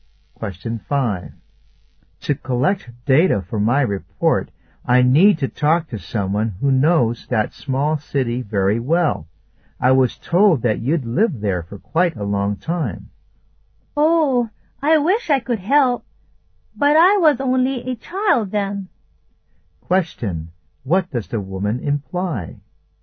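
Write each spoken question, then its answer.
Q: What does the woman imply?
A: She can't help, because she was only a child when she lived there.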